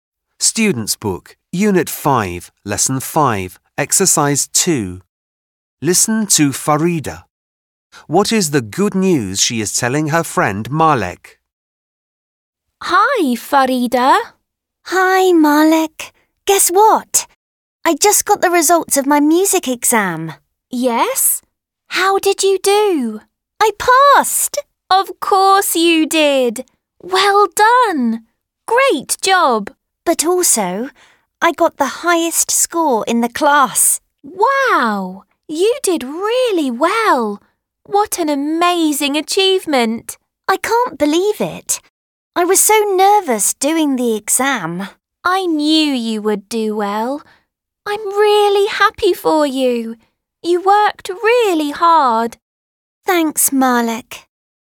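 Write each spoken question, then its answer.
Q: What is the good news she is telling her friend Malek?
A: She passed her music exam and got the highest score in the class.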